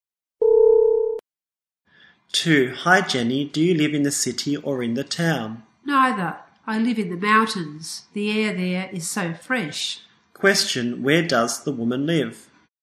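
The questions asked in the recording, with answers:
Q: Question, where does the woman live?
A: In the mountains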